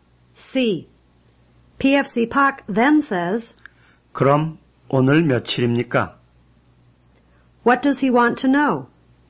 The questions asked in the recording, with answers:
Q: What does he want to know?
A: He wants to know today's date.